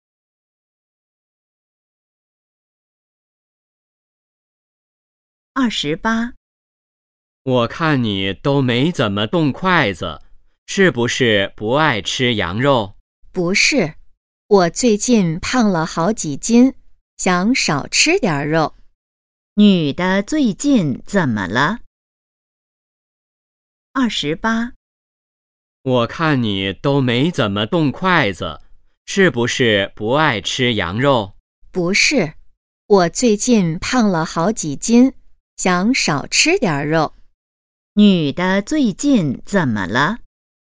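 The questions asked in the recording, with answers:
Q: 女的最近怎么了?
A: 胖了好几斤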